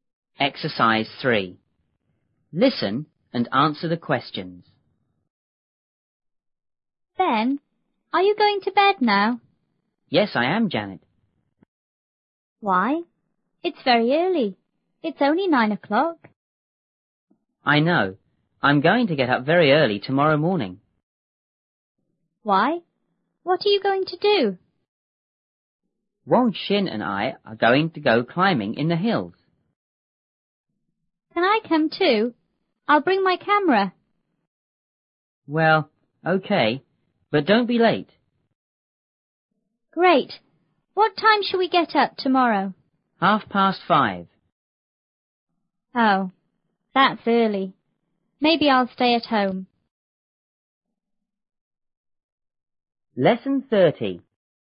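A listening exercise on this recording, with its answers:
3.Listen and answer the questions.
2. What is Ben going to do now?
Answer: He is going to bed.

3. Is it early or late?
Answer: It's early.

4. Is Ben going to get up early tomorrow?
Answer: Yes, he is.

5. What is Ben going to do tomorrow?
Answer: Go climbing in the hills.

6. Who is going with him?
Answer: Wang Xin

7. Does Janet want to go,too?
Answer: Yes, she does.

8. What time is Ben going to get up tomorrow?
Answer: At 5:30.

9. Is Janet going to go,too?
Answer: Maybe not; she may stay at home.

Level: 六年级下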